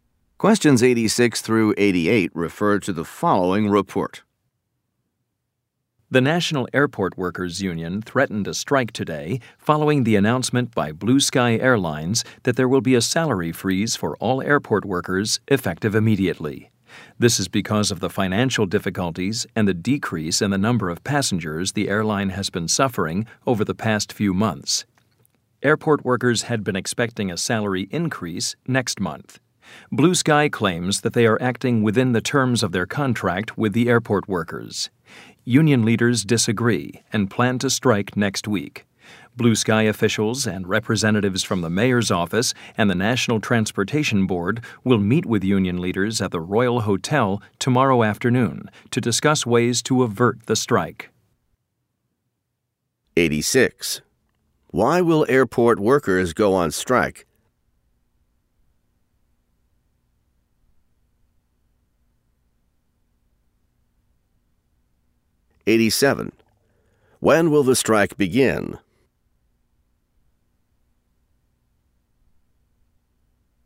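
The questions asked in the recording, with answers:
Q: Why will airport workers go on strike?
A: Because of a salary freeze

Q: When will the strike begin?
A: Next week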